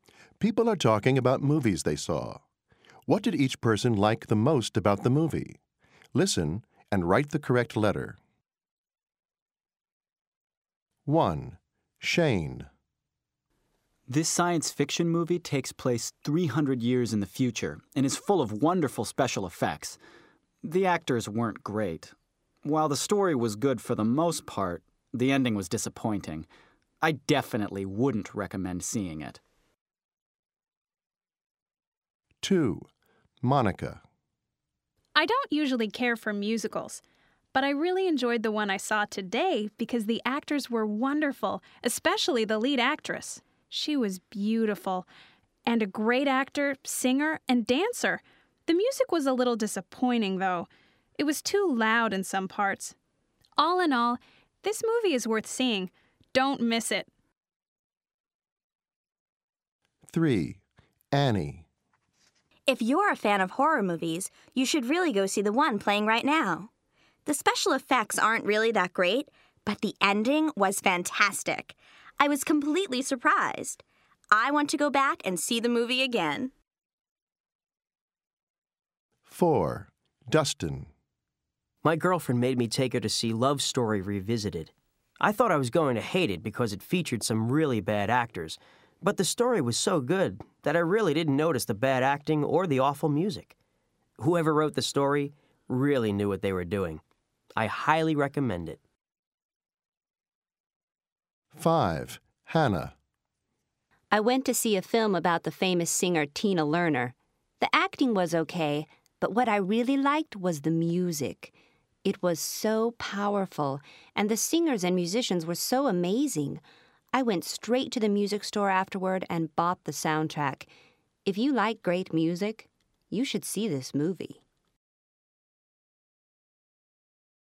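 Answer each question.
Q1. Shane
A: special effects

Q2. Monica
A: the actors

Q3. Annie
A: the ending

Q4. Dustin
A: the story

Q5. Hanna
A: the music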